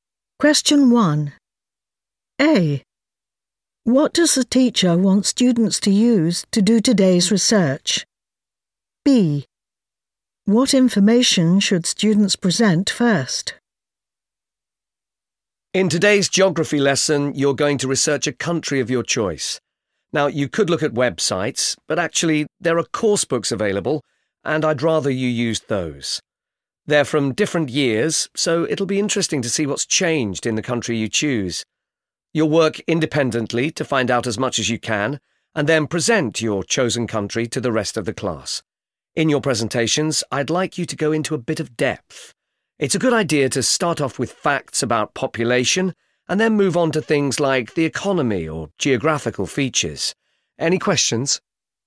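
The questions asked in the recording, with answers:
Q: What does the teacher want students to use to do today's research?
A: course books

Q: What information should students present first?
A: facts about population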